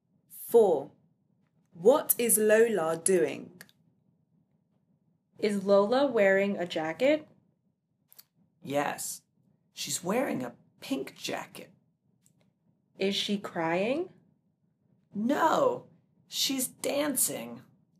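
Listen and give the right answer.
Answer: She's dancing.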